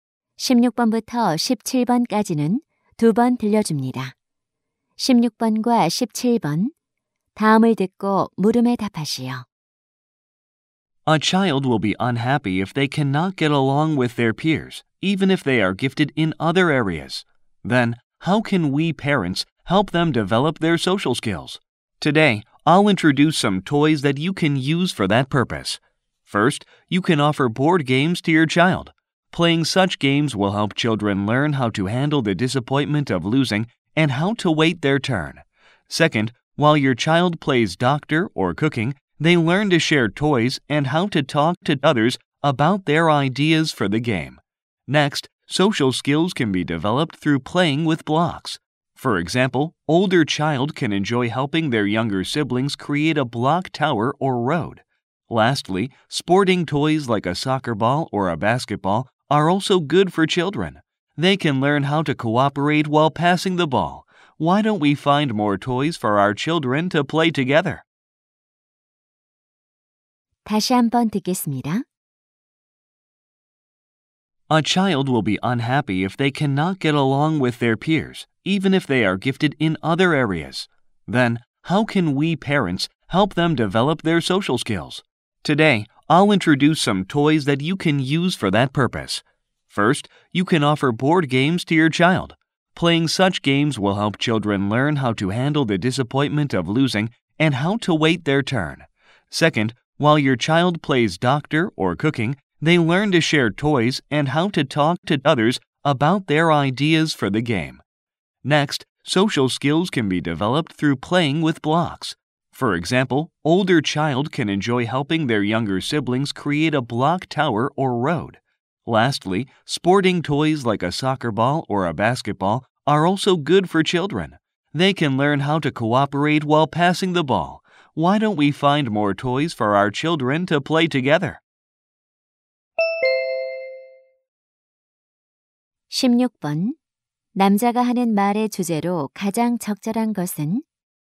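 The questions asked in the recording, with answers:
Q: 남자가 하는 말의 주제로 가장 적절한 것은?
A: 아이들의 사회성 발달에 도움이 되는 장난감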